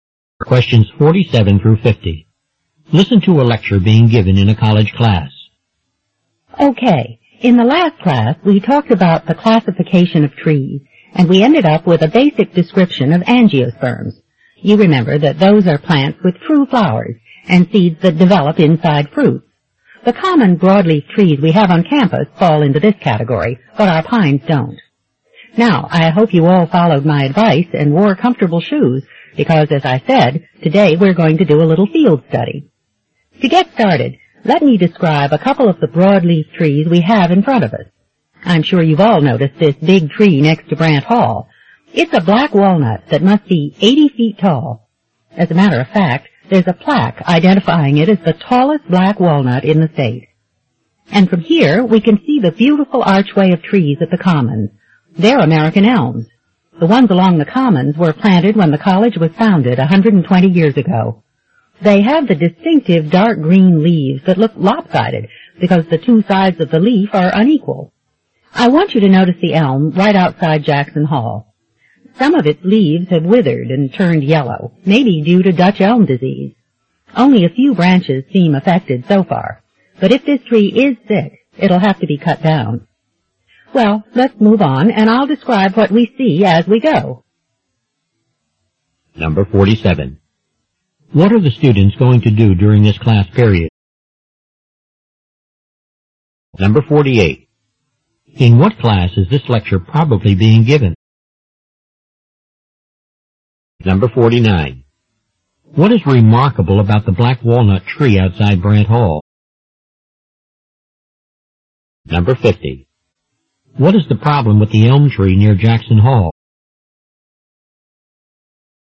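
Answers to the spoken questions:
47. Do a field study of trees on campus
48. Botany
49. It is the tallest black walnut in the state.
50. It may have Dutch elm disease.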